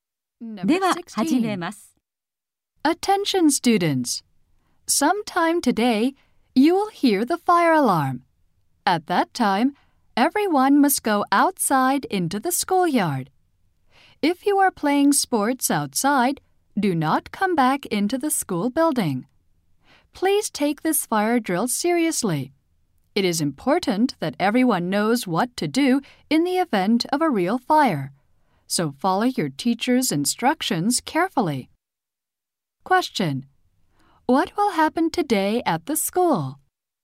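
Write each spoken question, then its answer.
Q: What will happen today at the school?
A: A fire drill.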